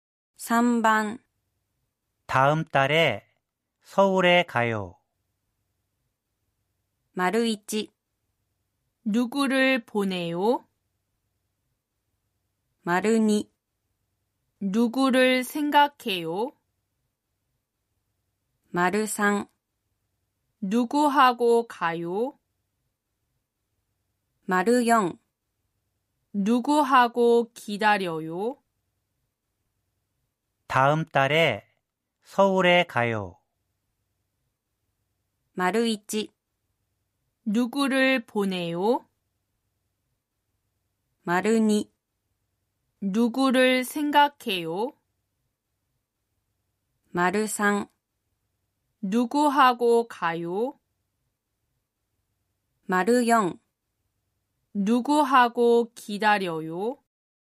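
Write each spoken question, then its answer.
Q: 다음달에서울에가요.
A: 3: 누구하고가요?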